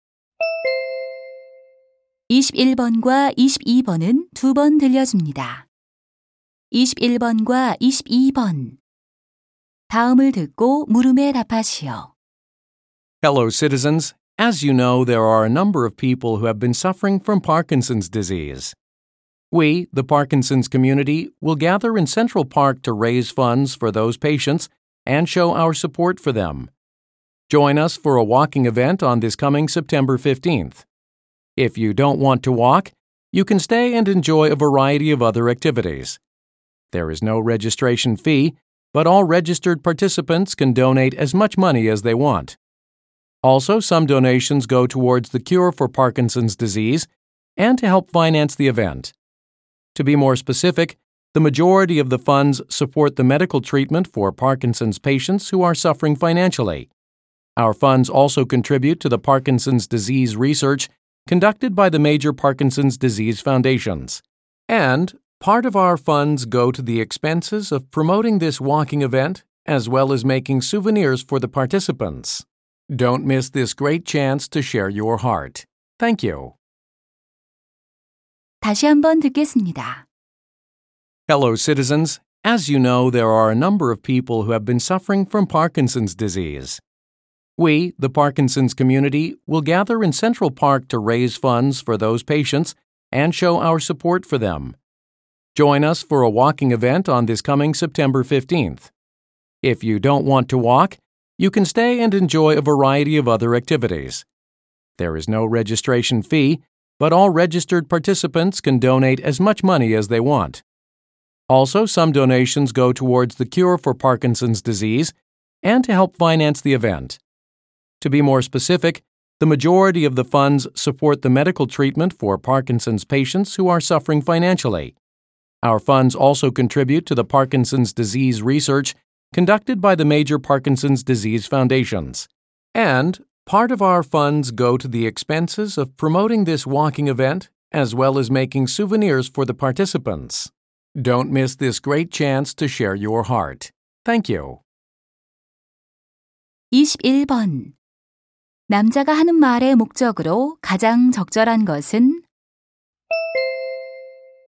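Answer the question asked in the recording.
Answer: 파킨슨병 환자를 위한 모금 걷기 행사 참여를 권유하려고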